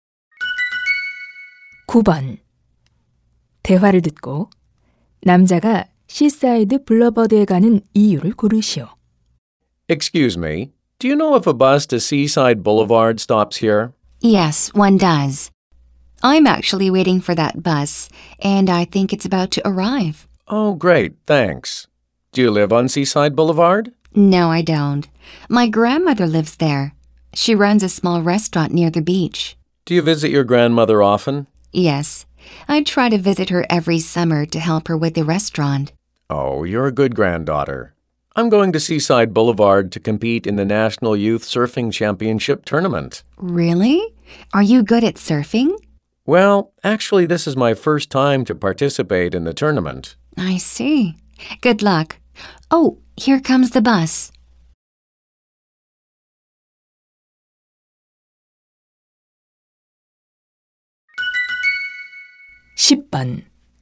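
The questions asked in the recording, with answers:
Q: 대화를 듣고 남자가 시사이드 블러버드에 가는 이유를 고르시오.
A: 서핑 대회에 참가하려고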